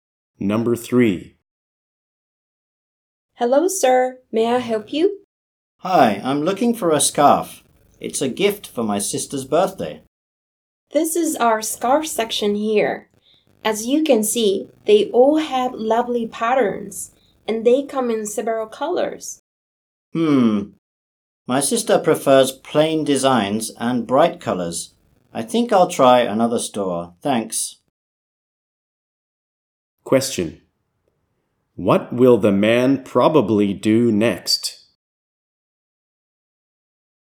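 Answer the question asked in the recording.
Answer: Go to another store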